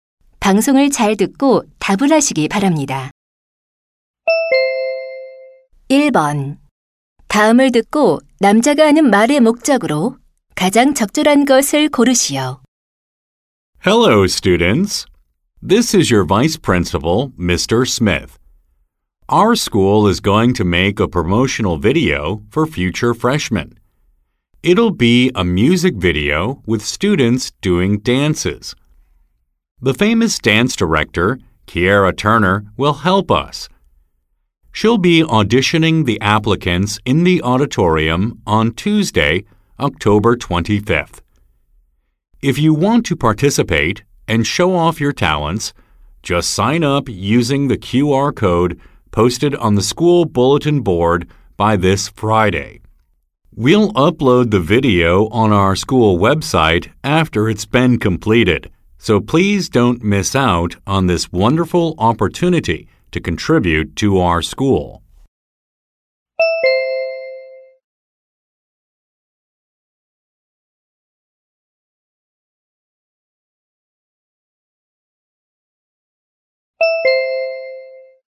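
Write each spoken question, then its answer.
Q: 다음을 듣고 남자가 하는 말의 목적으로 가장 적절한 것을 고르시오.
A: 학교 홍보 영상 댄스 오디션 참가를 권유하려고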